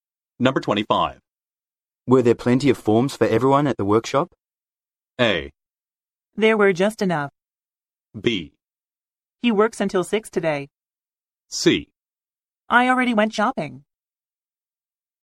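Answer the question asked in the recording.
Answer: A: There were just enough.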